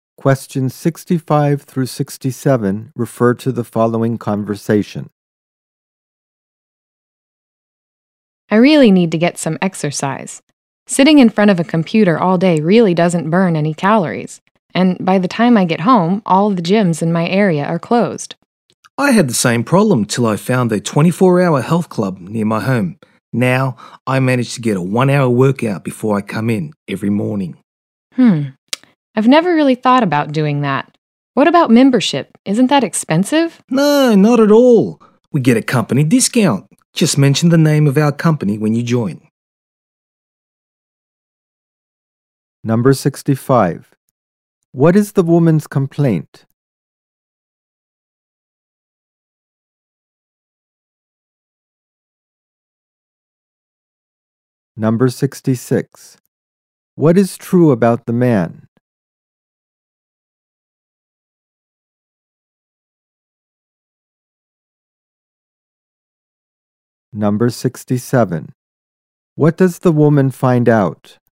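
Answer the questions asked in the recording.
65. She doesn't get enough exercise because she sits at a computer all day and gyms are closed when she gets home.
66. He works out for an hour at a 24-hour health club every morning before work.
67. The company gets a discount on membership.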